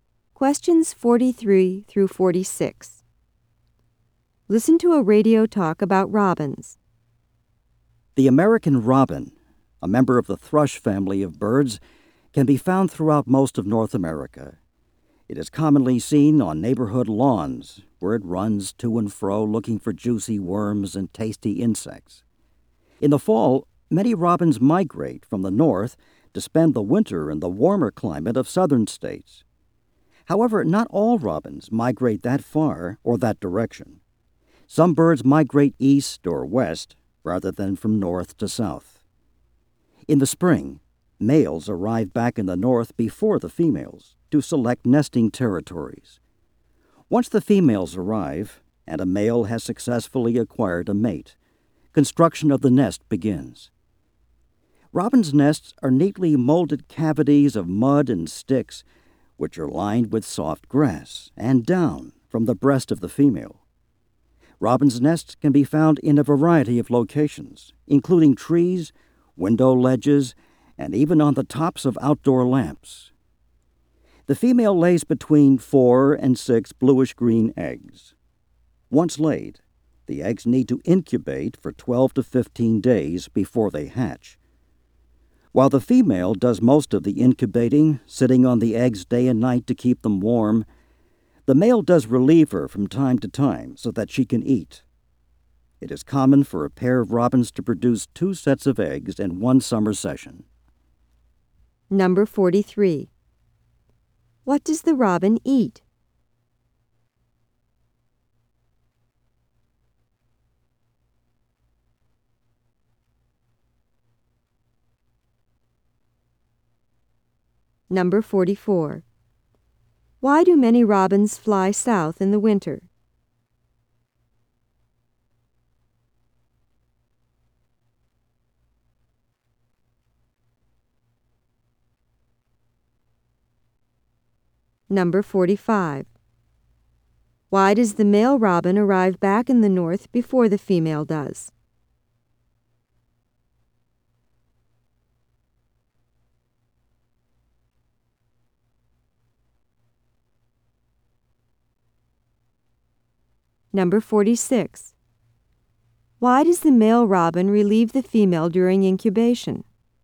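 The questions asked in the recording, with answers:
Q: What does the robin eat?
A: Worms and insects

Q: Why do many robins fly south in the winter?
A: For the warmer climate

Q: Why does the male robin arrive back in the north before the female does?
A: To select a nesting territory

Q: Why does the male robin relieve the female during incubation?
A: So she can eat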